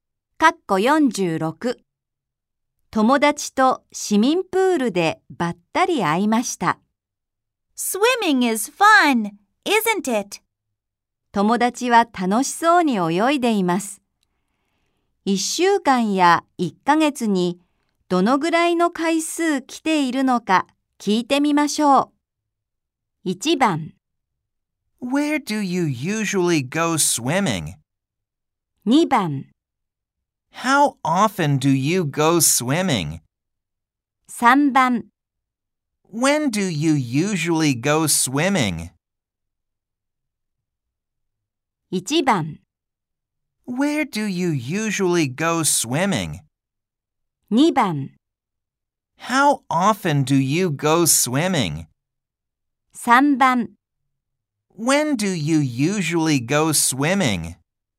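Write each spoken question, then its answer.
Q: 友達は楽しそうに泳いでいます。1週間や1ヶ月にどのぐらいの回数来ているのか聞いてみましょう。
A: 2: How often do you go swimming?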